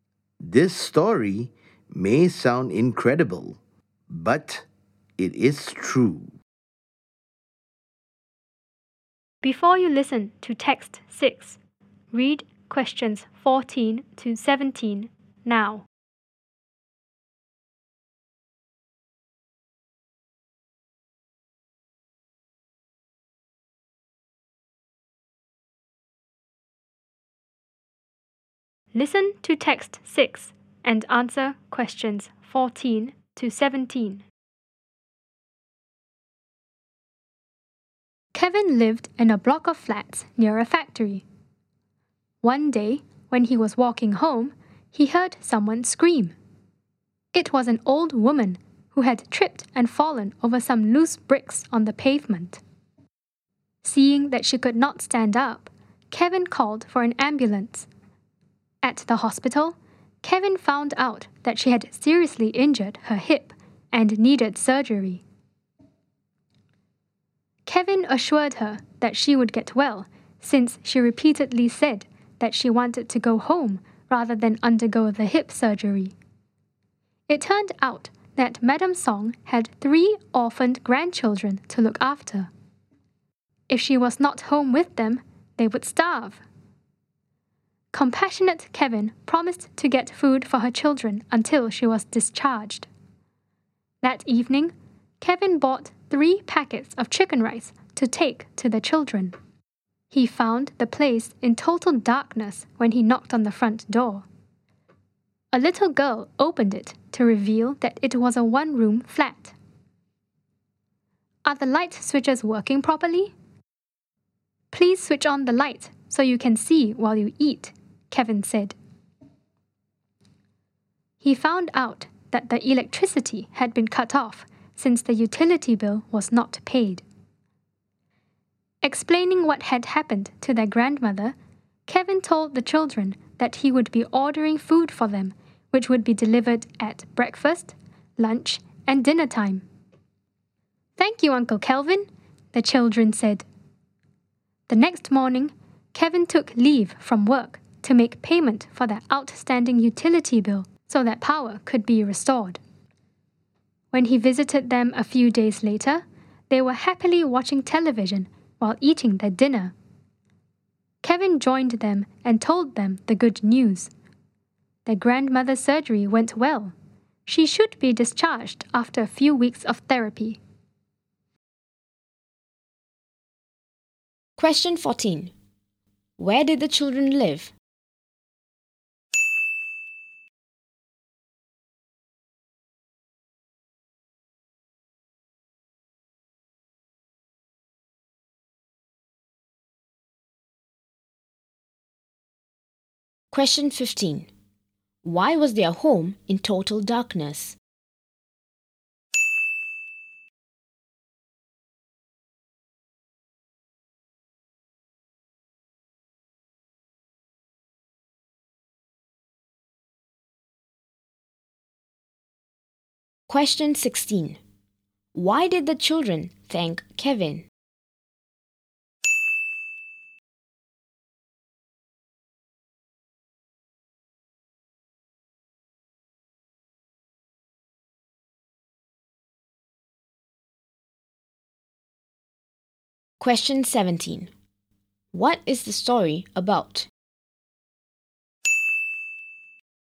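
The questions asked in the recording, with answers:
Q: Where did the children live?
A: In a one-room flat

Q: Why was their home in total darkness?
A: The electricity had been cut off because the utility bill was not paid

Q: Why did the children thank Kevin?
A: He would order food for them at breakfast, lunch and dinner time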